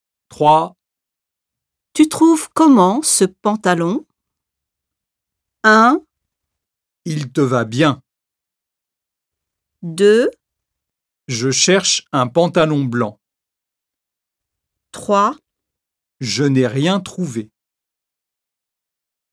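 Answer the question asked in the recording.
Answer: 1: Il te va bien.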